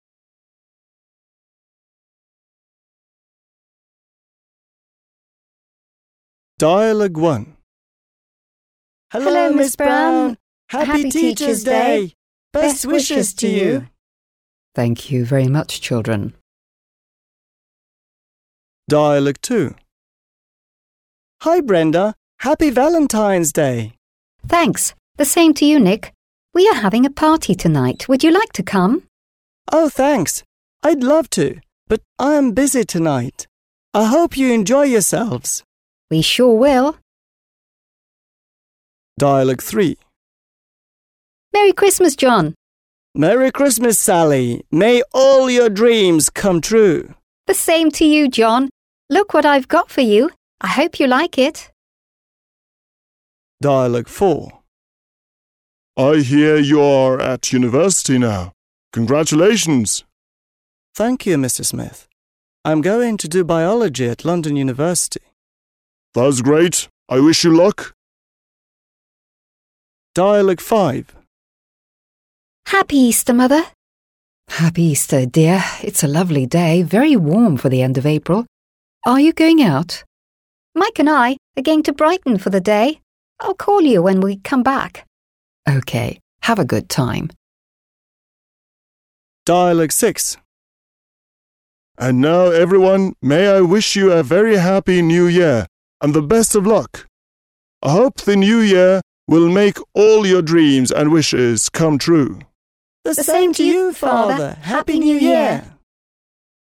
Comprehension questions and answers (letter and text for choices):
Listen and say when these people are talking.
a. 1 January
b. 14 February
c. 30 April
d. 2 September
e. 25 December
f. 5 October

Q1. Dialogue 1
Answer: f. 5 October

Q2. Dialogue 2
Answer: b. 14 February

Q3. Dialogue 3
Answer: e. 25 December

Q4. Dialogue 4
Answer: d. 2 September

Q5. Dialogue 5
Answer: c. 30 April

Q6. Dialogue 6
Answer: a. 1 January

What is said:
— Happy Teachers' Day. Best wishes to you.
— Thank you very much, children.
— Hi Brenda, Happy Valentine's Day.
— Thanks, the same to you Nick. We are having a party tonight, would you like to come?
— Oh thanks, I'd love to, but I am busy tonight. I hope you enjoy yourselves.
— We sure will.
— Merry Christmas John.
— Merry Christmas Sally. May all your dreams come true.
— The same to you John. Look what I've got for you. I hope you like it.
— I hear you are at university now. Congratulations.
— Thank you Mr. Smith. I'm going to do biology at London University.
— That's great. I wish you luck.
— Happy Easter Mother.
— Happy Easter dear. It's a lovely day, very warm for the end of April. Are you going out?
— Mike and I are going to Brighton for the day. I'll call you when we come back.
— OK, have a good time.
— And now everyone, may I wish you a very happy New Year and the best of luck. I hope the New Year will make all your dreams and wishes come true.

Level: 7 Класс